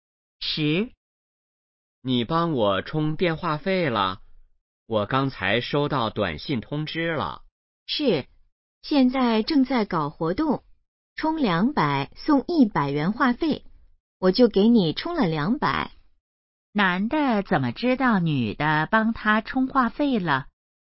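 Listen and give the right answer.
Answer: 收到了短信通知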